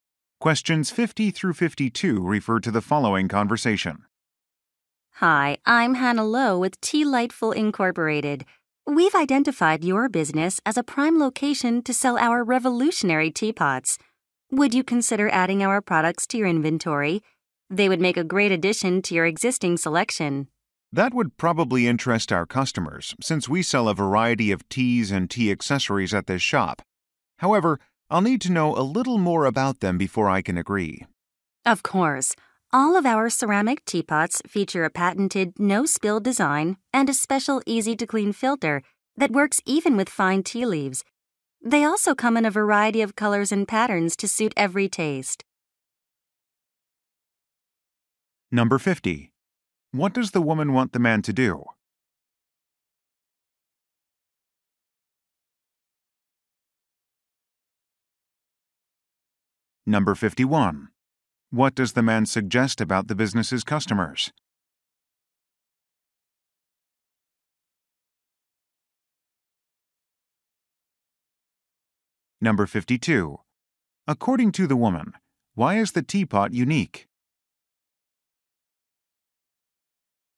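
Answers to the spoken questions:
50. Sell her company's teapots in his shop.
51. They would probably be interested, since they buy tea and tea accessories.
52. It has a patented no-spill design.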